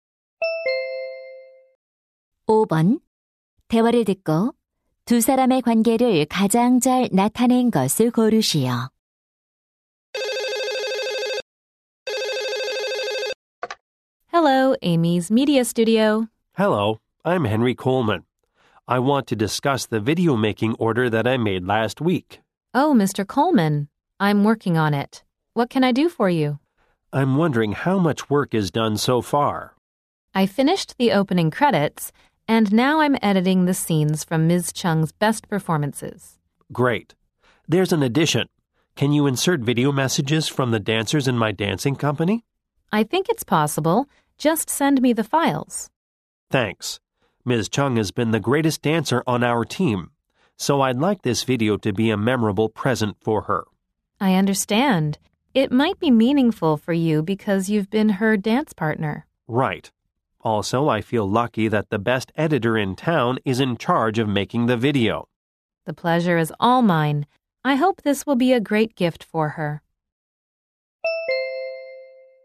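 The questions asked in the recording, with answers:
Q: 대화를 듣고 두 사람의 관계를 가장 잘 나타낸 것을 고르시오.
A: 영상 편집자 - 무용단원(의뢰인)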